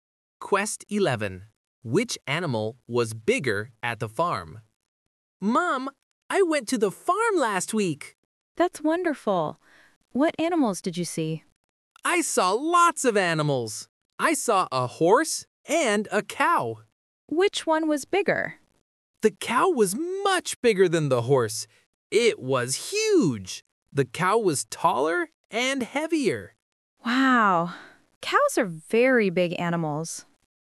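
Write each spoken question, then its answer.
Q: Which animal was bigger at the farm?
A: The cow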